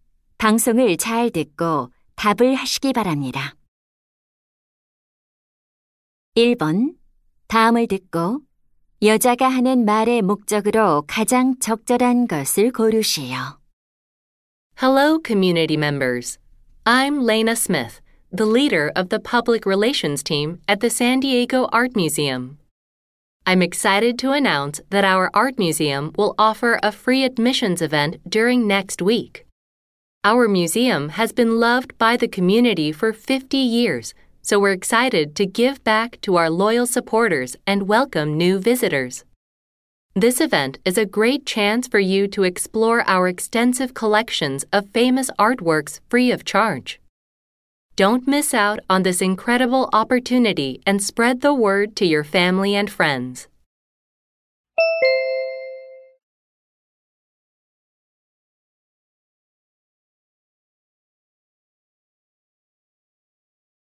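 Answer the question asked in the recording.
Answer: 미술관의 무료 입장 행사를 알리려고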